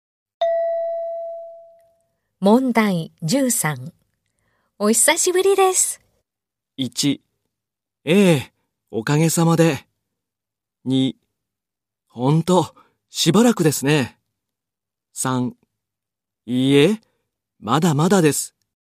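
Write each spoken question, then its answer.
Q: お久しぶりです。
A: 2: ほんと、しばらくですね。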